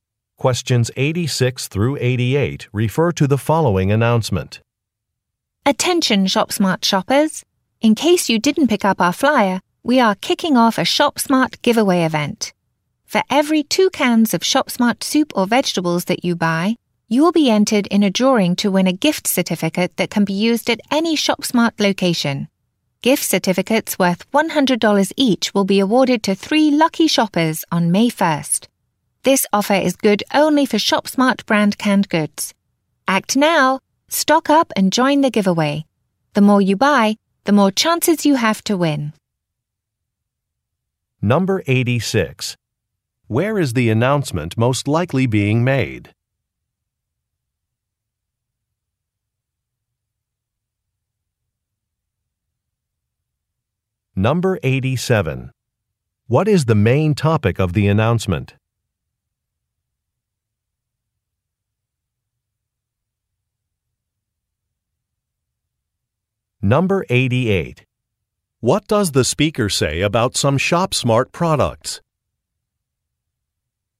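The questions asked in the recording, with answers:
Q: Where is the announcement most likely being made?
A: At a ShopSmart store

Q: What is the main topic of the announcement?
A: A giveaway event

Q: What does the speaker say about some ShopSmart products?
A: Buying ShopSmart canned goods enters shoppers in a drawing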